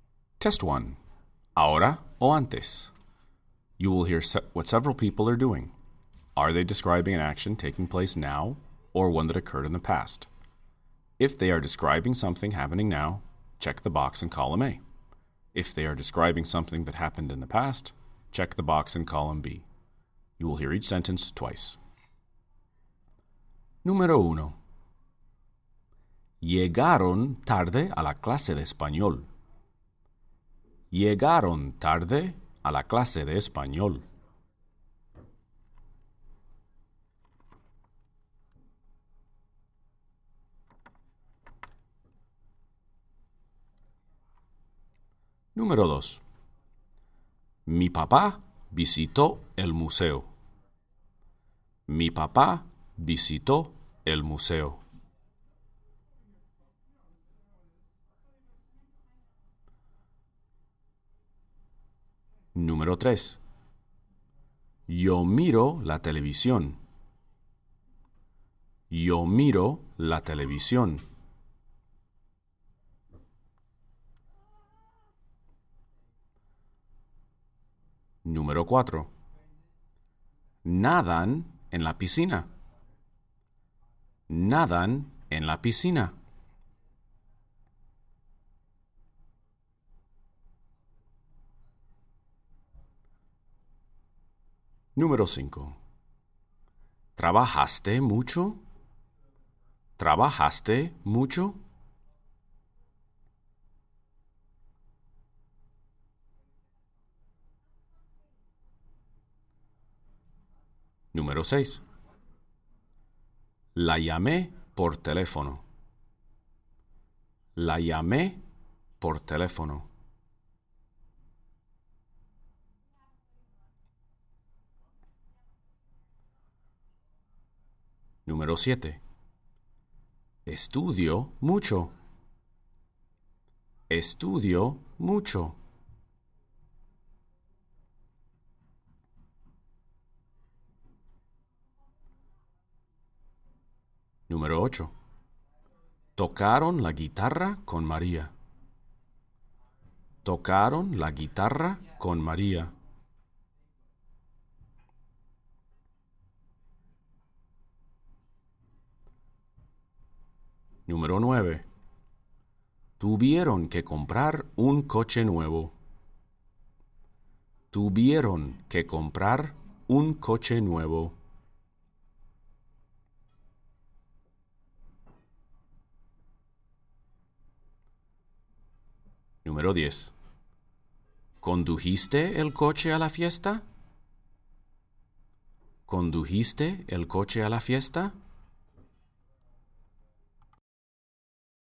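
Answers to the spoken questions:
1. B: past
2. B: past
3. A: now
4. A: now
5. B: past
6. B: past
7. A: now
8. B: past
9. B: past
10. B: past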